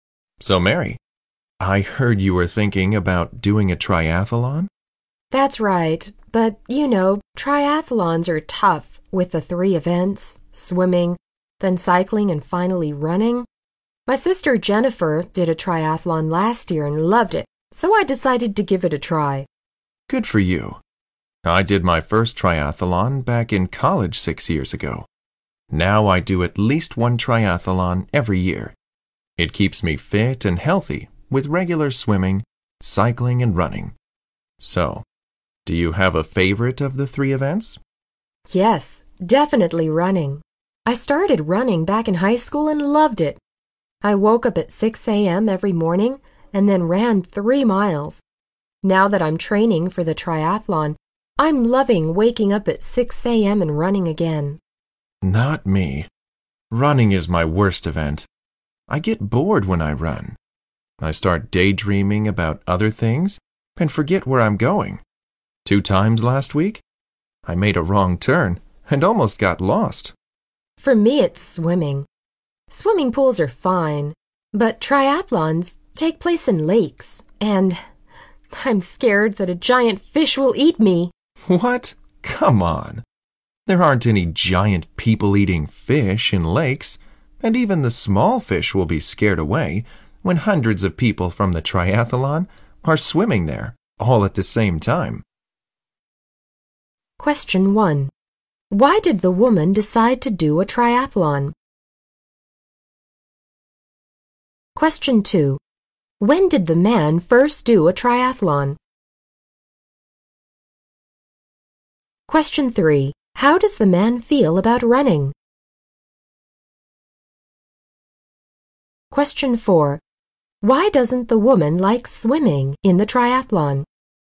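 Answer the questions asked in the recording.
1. Her sister did one last year and loved it
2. In college, 6 years ago
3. It bores him; it's his worst event
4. She's afraid a giant fish in the lake will eat her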